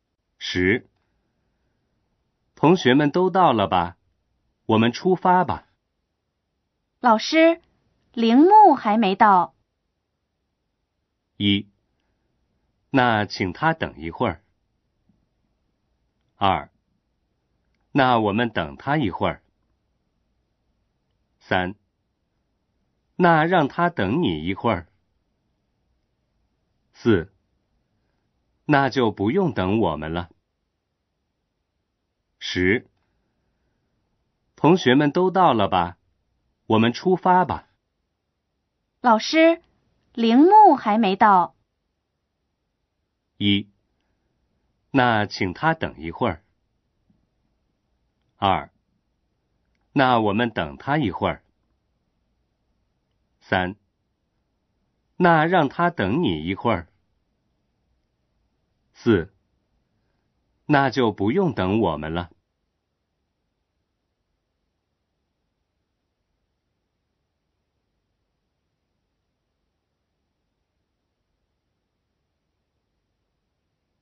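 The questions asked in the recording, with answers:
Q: 老师,铃木还没到。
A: 二: 那我们等他一会儿。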